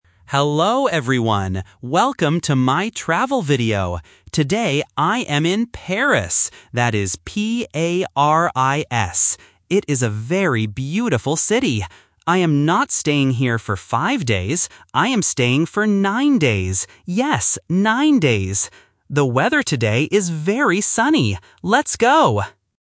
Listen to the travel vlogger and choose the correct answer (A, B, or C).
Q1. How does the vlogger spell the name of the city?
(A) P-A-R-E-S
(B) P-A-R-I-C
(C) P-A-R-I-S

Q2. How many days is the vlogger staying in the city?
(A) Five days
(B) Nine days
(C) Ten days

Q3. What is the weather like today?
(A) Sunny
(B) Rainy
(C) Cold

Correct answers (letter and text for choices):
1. (C) P-A-R-I-S
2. (B) Nine days
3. (A) Sunny

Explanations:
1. The vlogger spells the city name clearly: P-A-R-I-S. Option (A) uses the letter "E", and Option (B) uses the letter "C", which are common spelling mistakes for beginners.
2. The vlogger clearly says, "I am staying for nine days." Option (A) is the trap because the word "five" is mentioned, but in a negative sentence: "I am not staying here for five days." Option (C) is not mentioned.
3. The vlogger says, "The weather today is very sunny." Options (B) and (C) are common weather words but are not mentioned in the audio.

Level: A1